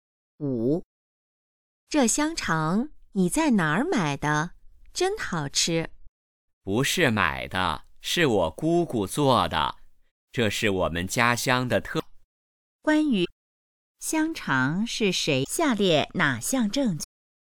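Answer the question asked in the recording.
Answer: 香肠是姑姑做的,是家乡特产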